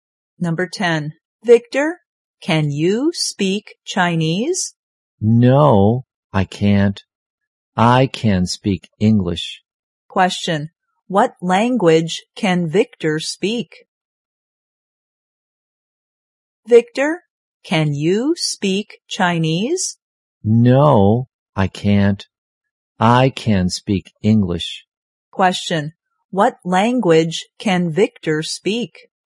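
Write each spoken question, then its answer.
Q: What language can Victor speak?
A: English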